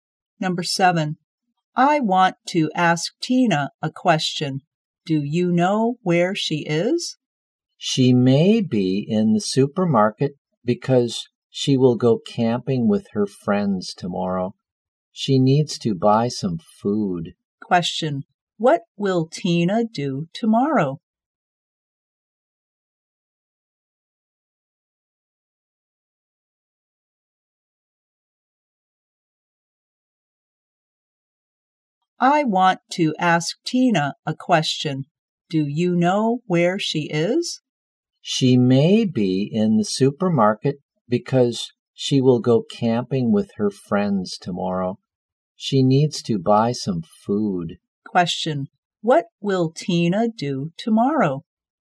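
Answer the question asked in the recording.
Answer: Go camping with her friends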